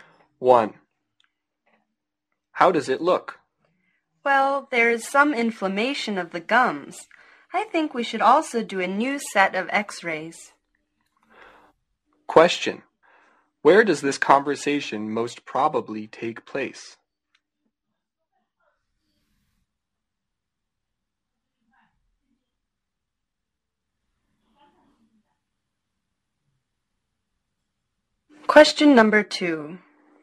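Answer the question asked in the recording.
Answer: At a dentist's office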